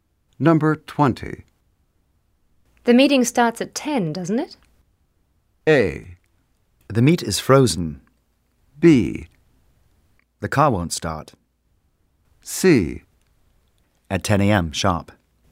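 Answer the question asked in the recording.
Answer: C: At 10 a.m. sharp.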